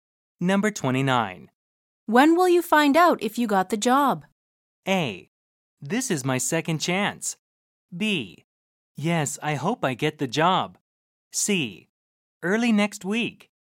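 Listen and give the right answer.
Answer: C: Early next week.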